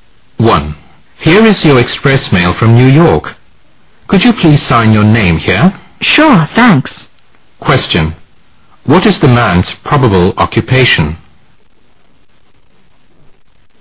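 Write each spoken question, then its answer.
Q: What is the man's probable occupation?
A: A mail carrier / courier delivering express mail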